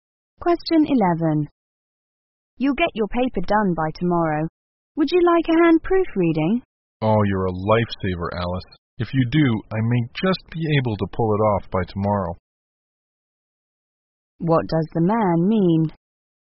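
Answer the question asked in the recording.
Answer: With Alice's help proofreading, he may finish his paper by tomorrow.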